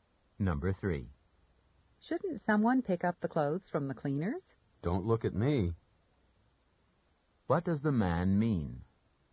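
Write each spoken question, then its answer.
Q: What does the man mean?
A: He won't pick up the clothes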